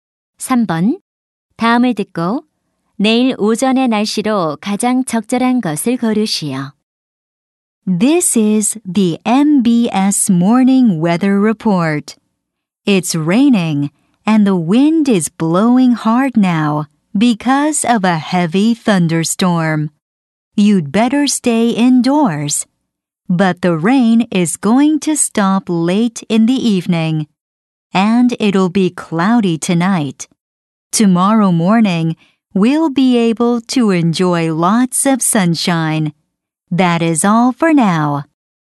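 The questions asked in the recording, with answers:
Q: 다음을 듣고 내일 오전의 날씨로 가장 적절한 것을 고르시오.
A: 맑음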